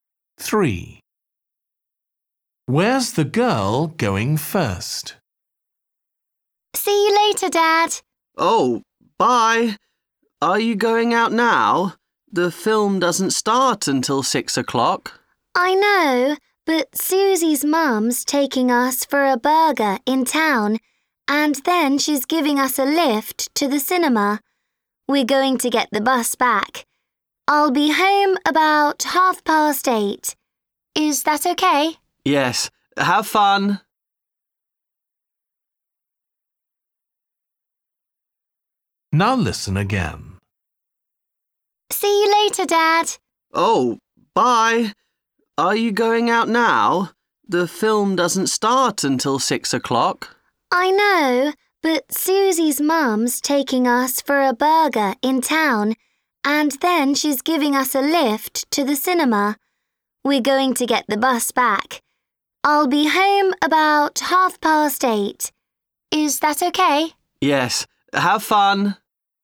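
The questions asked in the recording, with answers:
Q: Where's the girl going first?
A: To town for a burger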